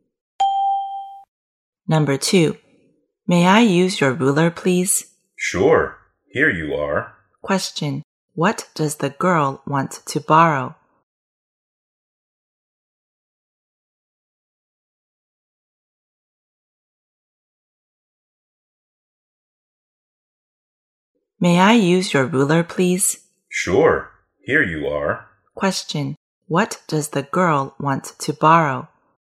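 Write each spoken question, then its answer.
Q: what does the girl want to borrow?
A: A ruler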